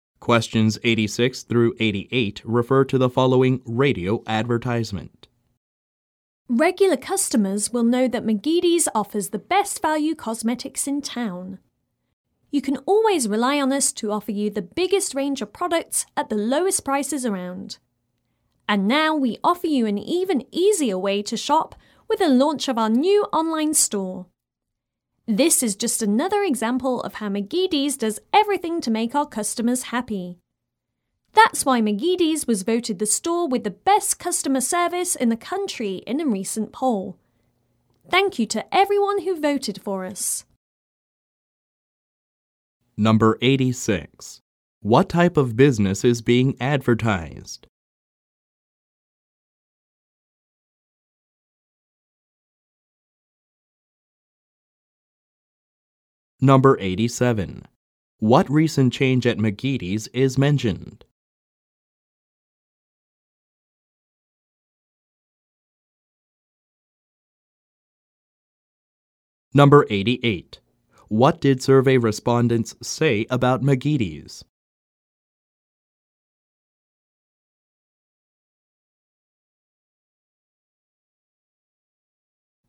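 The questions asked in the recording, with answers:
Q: What type of business is being advertised?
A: A cosmetics store

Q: What recent change at McGeady's is mentioned?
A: It launched a new online store

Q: What did survey respondents say about McGeady's?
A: It has the best customer service in the country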